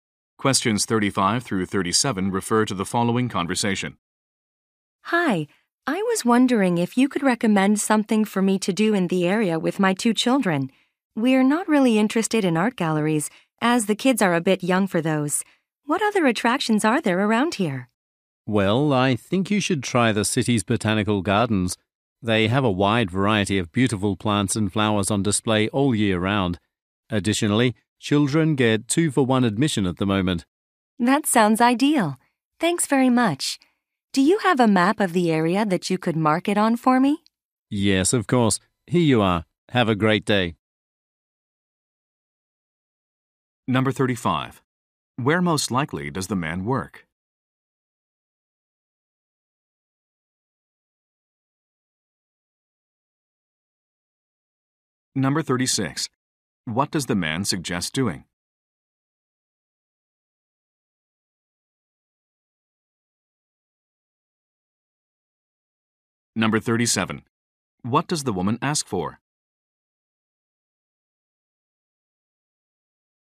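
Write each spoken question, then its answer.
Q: What does the man suggest doing?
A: Visiting the city's botanical gardens

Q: What does the woman ask for?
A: A map of the area with the gardens marked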